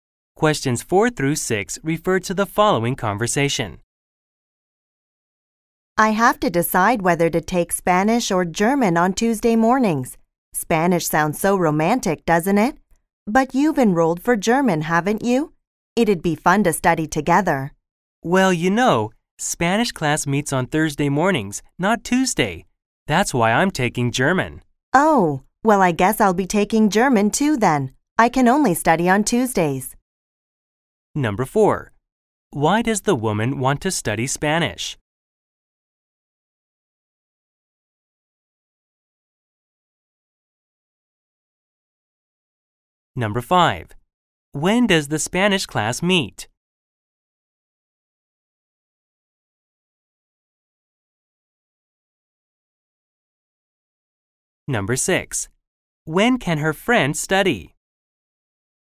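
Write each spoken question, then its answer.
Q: When does the Spanish class meet?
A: Thursday mornings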